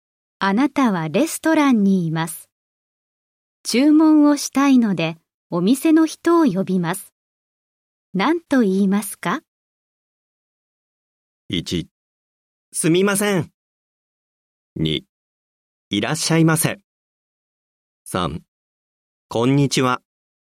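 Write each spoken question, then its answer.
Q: あなたはレストランにいます。注文をしたいので、お店の人を呼びます。何と言いますか?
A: 1: すみません。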